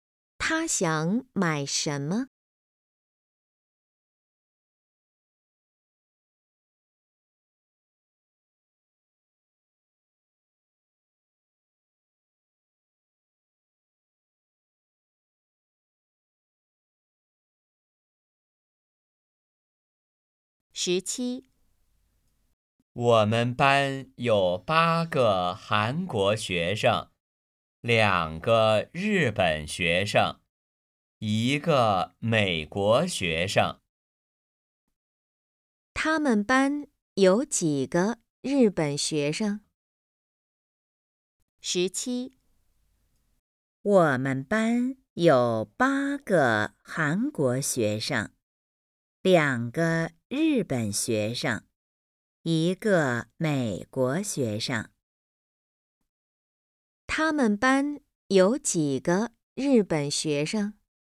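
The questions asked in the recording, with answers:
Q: 他们班有几个日本学生?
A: 两个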